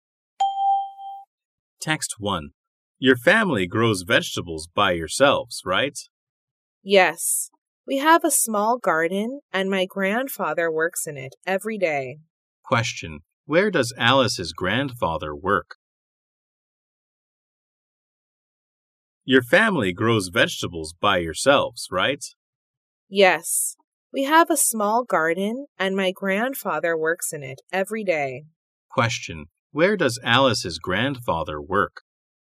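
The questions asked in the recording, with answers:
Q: Where does Alice's grandfather work?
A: In a small garden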